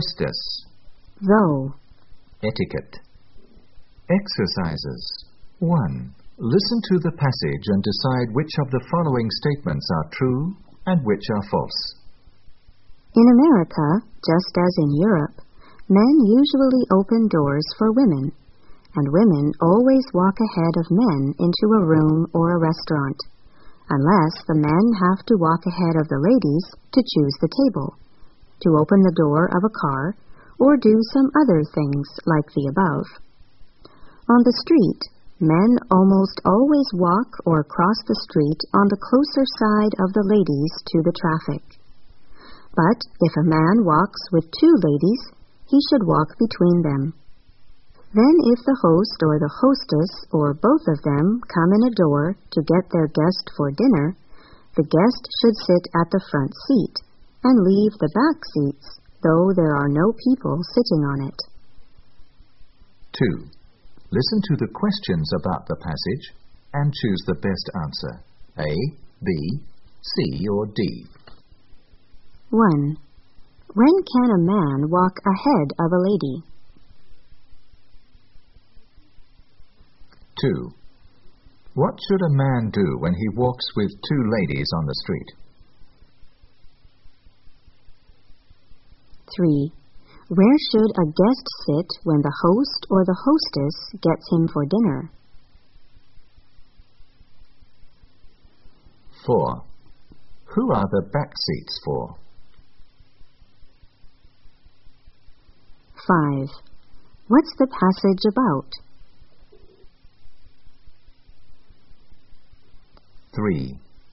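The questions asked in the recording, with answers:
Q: When can a man walk ahead of a lady?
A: When he has to choose the table or open the car door

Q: What should a man do when he walks with two ladies on the street?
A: Walk between them

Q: Where should a guest sit when the host or the hostess gets him for dinner?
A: In the front seat

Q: What's the passage about?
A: Manners/etiquette in America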